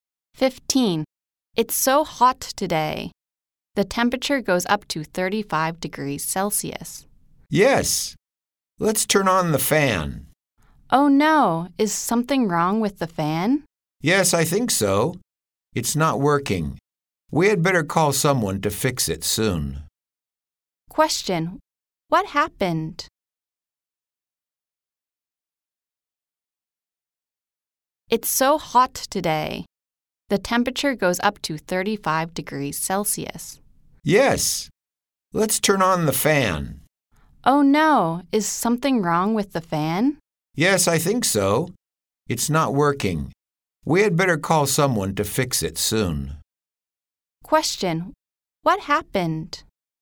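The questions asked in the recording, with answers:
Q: What happened?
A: The fan is broken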